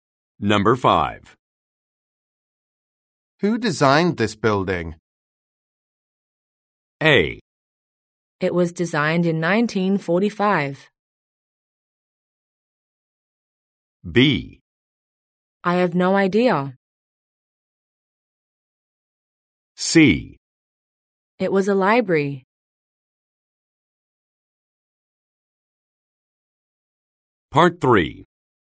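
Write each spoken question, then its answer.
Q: Who designed this building?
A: B: I have no idea.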